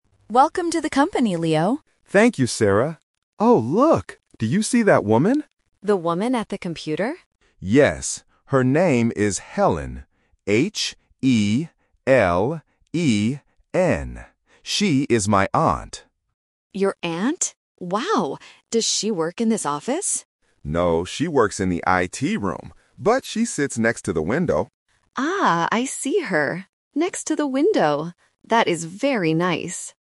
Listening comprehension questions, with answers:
Listen to the conversation between two coworkers. Choose the correct answer (A, B, or C) for each question.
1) Who is the woman they are looking at?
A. Leo's mother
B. Leo's aunt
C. Leo's sister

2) What is the woman's name?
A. Helen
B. Ellen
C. Karen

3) Where does the woman sit?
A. At the computer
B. Next to the door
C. Next to the window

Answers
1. B
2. A
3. C

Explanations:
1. Leo clearly points to the woman and says, "She is my aunt." Option A (mother) and Option C (sister) are other female family members used as distractors to test if the listener caught the exact word.
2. Leo spells her name letter by letter: H-E-L-E-N. Option B (Ellen) is a phonetic trap because it sounds very similar to Helen, especially if the listener misses the "H" sound. Option C (Karen) is just a plausible name.
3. Leo states clearly, "...she sits next to the window," and Sarah repeats this location. Option A (At the computer) is a trap because Sarah asks, "The woman at the computer?" at the beginning of the conversation. Option B (Next to the door) is not mentioned.

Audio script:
Sarah: Welcome to the company, Leo.
Leo: Thank you, Sarah. Oh, look! Do you see that woman?
Sarah: The woman at the computer?
Leo: Yes. Her name is Helen. H-E-L-E-N. She is my aunt.
Sarah: Your aunt? Wow! Does she work in this office?
Leo: No, she works in the IT room. But she sits next to the window.

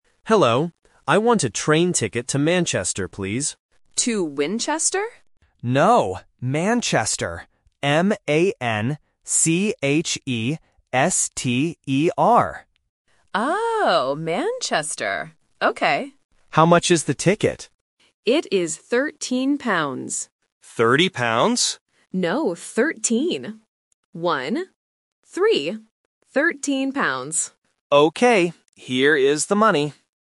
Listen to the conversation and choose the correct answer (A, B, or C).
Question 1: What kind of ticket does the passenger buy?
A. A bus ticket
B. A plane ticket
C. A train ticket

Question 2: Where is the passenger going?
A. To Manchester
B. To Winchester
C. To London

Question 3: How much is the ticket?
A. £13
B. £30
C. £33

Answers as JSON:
{"1": "C", "2": "A", "3": "A"}

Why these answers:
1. The passenger says clearly at the beginning, "I want a train ticket." Options (A) and (B) are distractors related to transport but are not mentioned in the audio.
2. The passenger wants to go to Manchester and spells it out: "M-A-N-C-H-E-S-T-E-R." Option (B) is a trap because the agent mishears the city name at first ("To Winchester?"). Option (C) is a famous city in the UK but is not mentioned.
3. The agent says the ticket is "thirteen pounds" and repeats it as "One - three." Option (B) is a trap because the passenger mishears it as "Thirty" (30), but the agent quickly corrects him. Option (C) is a random number distractor.

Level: A1

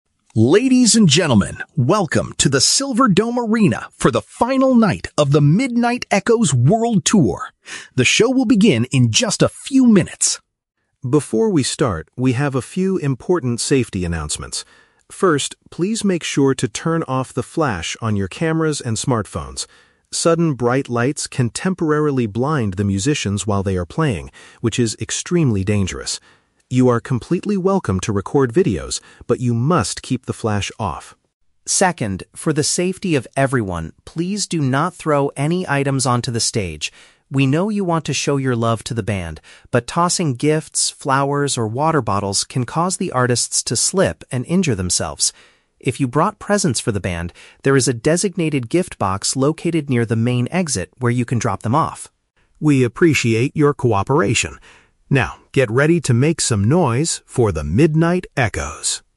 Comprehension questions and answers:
Listen to a stadium announcement before a concert. Choose the correct answer (A, B, or C) for each question.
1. Why are audiences asked to turn off their camera flashes?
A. Because sudden lights can negatively affect the performers' vision.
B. Because professional photographers are already recording the show.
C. Because using the flash drains smartphone batteries very quickly.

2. What is the rule regarding throwing items on the stage?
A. It is encouraged only if fans are throwing soft items like flowers.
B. It is strictly forbidden because it creates a physical hazard for the band.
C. It is allowed at the very end of the concert to show love to the artists.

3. What should fans do if they brought presents for the musicians?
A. Hand them directly to the security guards standing at the front.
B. Bring them backstage after the live performance is completely over.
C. Leave them in a specific collection area near the door.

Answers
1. A
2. B
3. C

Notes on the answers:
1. The announcer states that "sudden bright lights can temporarily blind the musicians" (which paraphrases to negatively affecting the performers' vision). Why the traps are wrong: (B) and (C) are both plausible real-world reasons for not using flash at events, but neither is mentioned in the audio.
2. The announcer says not to throw items because it "can cause the artists to slip and injure themselves" (which means it creates a physical hazard). Why the traps are wrong: (A) is a trap. The announcer explicitly mentions "flowers" as one of the things you should not throw. (C) is a trap. The rule applies to the whole show, and throwing things is never allowed.
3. Fans are instructed to use a "designated gift box located near the main exit" (which paraphrases to a specific collection area near the door). Why the traps are wrong: (A) and (B) are plausible actions at a concert, but the announcement specifically directs fans to the gift box at the exit, not to security guards or the backstage area.

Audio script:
Announcer: "Ladies and gentlemen, welcome to the Silverdome Arena for the final night of The Midnight Echoes world tour! The show will begin in just a few minutes.
Before we start, we have a few important safety announcements. First, please make sure to turn off the flash on your cameras and smartphones. Sudden bright lights can temporarily blind the musicians while they are playing, which is extremely dangerous. You are completely welcome to record videos, but you must keep the flash off.
Second, for the safety of everyone, please do not throw any items onto the stage. We know you want to show your love to the band, but tossing gifts, flowers, or water bottles can cause the artists to slip and injure themselves. If you brought presents for the band, there is a designated gift box located near the main exit where you can drop them off.
We appreciate your cooperation. Now, get ready to make some noise for The Midnight Echoes!"

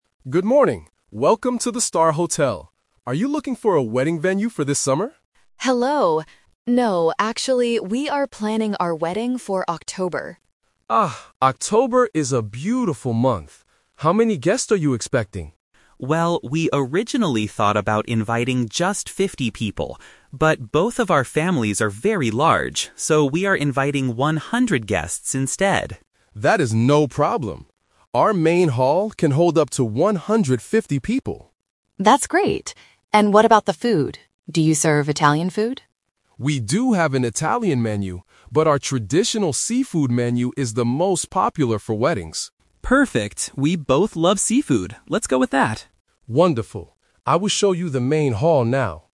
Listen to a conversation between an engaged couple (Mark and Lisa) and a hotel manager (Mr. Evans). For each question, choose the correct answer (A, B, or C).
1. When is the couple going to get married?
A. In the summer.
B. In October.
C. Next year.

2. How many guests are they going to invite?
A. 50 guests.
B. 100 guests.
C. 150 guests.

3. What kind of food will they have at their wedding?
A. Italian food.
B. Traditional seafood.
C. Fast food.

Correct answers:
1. B
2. B
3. B

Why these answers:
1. The manager asks if the wedding is for "this summer" (Option A - Trap), but Lisa corrects him and says, "we are planning our wedding for October" (Option B - Key). Option C is not mentioned.
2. Mark says they "originally thought about inviting just 50 people" (Option A - Trap). However, because their families are large, they are "inviting 100 guests instead" (Option B - Key). Option C is a trap because 150 is the maximum capacity of the hall, not the number of guests.
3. Lisa asks about "Italian food" (Option A - Trap). The manager says they have it, but suggests the "traditional seafood menu". Mark agrees and says, "we both love seafood. Let's go with that" (Option B - Key). Option C is not mentioned.

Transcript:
Evans: Good morning! Welcome to the Star Hotel. Are you looking for a wedding venue for this summer?
Lisa: Hello. No, actually, we are planning our wedding for October.
Mr. Evans: Ah, October is a beautiful month. How many guests are you expecting?
Mark: Well, we originally thought about inviting just 50 people. But, both of our families are very large, so we are inviting 100 guests instead.
Mr. Evans: That is no problem. Our main hall can hold up to 150 people.
Lisa: That's great! And what about the food? Do you serve Italian food?
Evans: We do have an Italian menu, but our traditional seafood menu is the most popular for weddings.
Mark: Perfect, we both love seafood. Let's go with that.

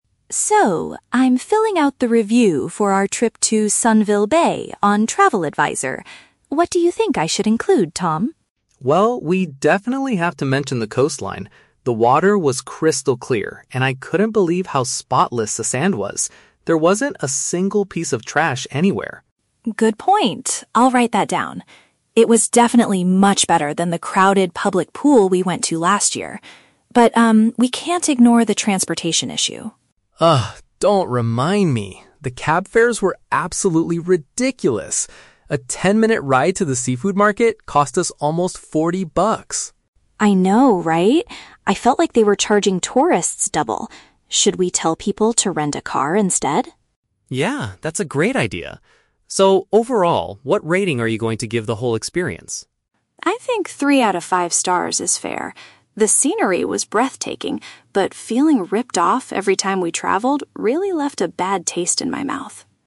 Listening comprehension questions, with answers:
Listen to a brother and sister discussing a travel review they are writing. Choose the correct answer (A, B, or C).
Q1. What impressed the siblings most about the beach?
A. It was not very crowded.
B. It was extremely clean.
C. It was better than the public pool.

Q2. What was their main complaint about the trip?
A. Renting a car was too difficult.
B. The seafood market was far away.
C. Taking a taxi was very expensive.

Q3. Why does Emma decide to give a three-star rating?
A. Because she had mixed feelings about the vacation.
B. Because she got sick from the local seafood.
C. Because the natural scenery was very disappointing.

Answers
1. B
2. C
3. A

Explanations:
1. Tom says the sand was "spotless" and there wasn't "a single piece of trash." This is a B1-level paraphrase for being "extremely clean." The Trap: Option (C) is a trap. Emma mentions the public pool, but that was where they went last year, not a feature of the beach itself. Option (A) is plausible for a beach review but was not mentioned in the audio.
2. Tom complains that the "cab fares were absolutely ridiculous" and cost them "almost forty bucks" for a short ride. "Cab fares" is a synonym for "taking a taxi," and "ridiculous/forty bucks" implies it was expensive. The Trap: Option (A) is a trap because Emma mentions "rent a car," but she suggests it as a solution for future tourists, not as the complaint.
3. Emma says the rating is fair because "the scenery was breathtaking, but feeling ripped off... left a bad taste in my mouth." She experienced both very good and very bad things, which means she had "mixed feelings." The Trap: Option (C) uses the word "scenery," which is in the audio, but the option says it was "disappointing." Emma actually said the scenery was "breathtaking" (beautiful). Option (B) is a logical guess for a travel issue but is never mentioned.

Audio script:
Emma: So, I'm filling out the review for our trip to Sunville Bay on TravelAdvisor. What do you think I should include, Tom?
Tom: Well, we definitely have to mention the coastline. The water was crystal clear, and I couldn't believe how spotless the sand was. There wasn't a single piece of trash anywhere.
Emma: Good point, I'll write that down. It was definitely much better than the crowded public pool we went to last year. But, um, we can't ignore the transportation issue.
Tom: Ugh, don't remind me. The cab fares were absolutely ridiculous! A ten-minute ride to the seafood market cost us almost forty bucks.
Emma: I know, right? I felt like they were charging tourists double. Should we tell people to rent a car instead?
Tom: Yeah, that's a great idea. So, overall, what rating are you going to give the whole experience?
Emma: I think three out of five stars is fair. The scenery was breathtaking, but feeling ripped off every time we traveled really left a bad taste in my mouth.

